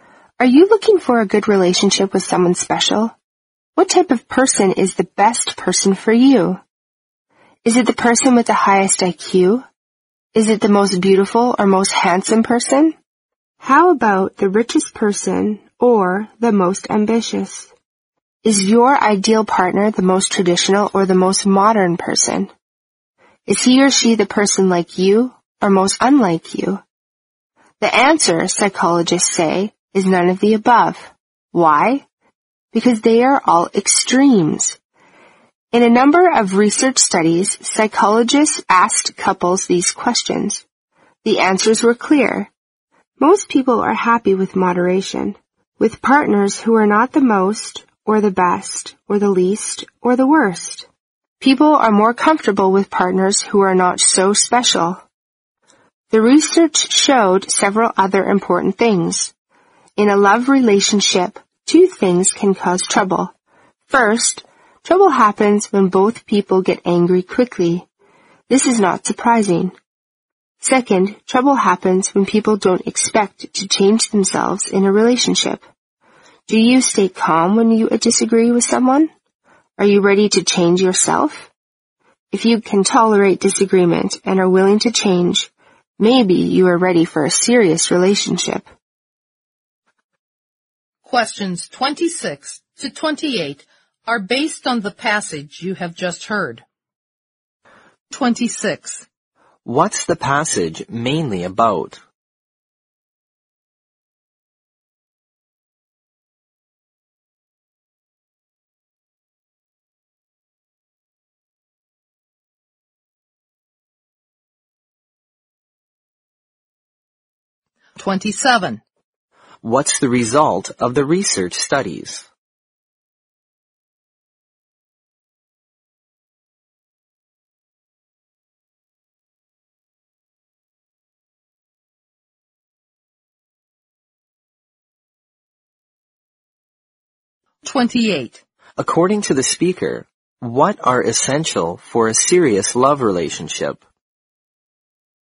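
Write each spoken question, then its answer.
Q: What's the result of the research studies?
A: Most people are happy with moderate partners who are not extreme

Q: According to the speaker, what are essential for a serious love relationship?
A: Tolerating disagreement and being willing to change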